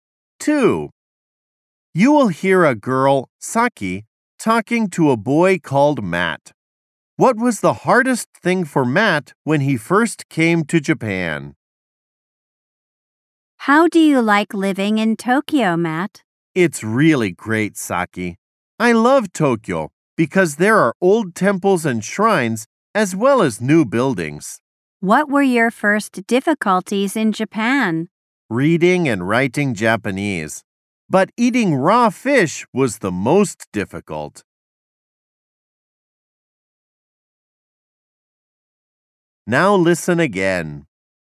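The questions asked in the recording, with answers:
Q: What was the hardest thing for Matt when he first came to Japan?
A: Eating raw fish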